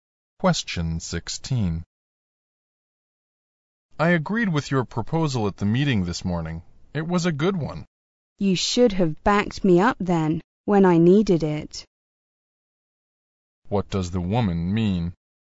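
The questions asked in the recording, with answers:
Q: What does the woman mean?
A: The man should have supported her at the meeting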